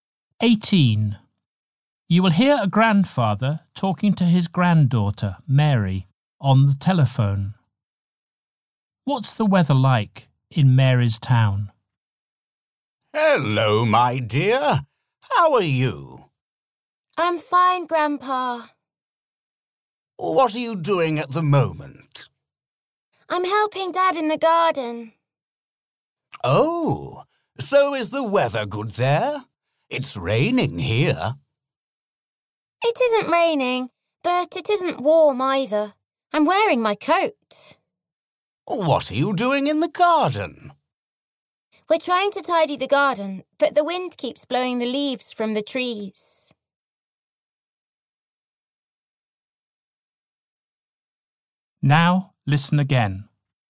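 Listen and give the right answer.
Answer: Cold and windy, not raining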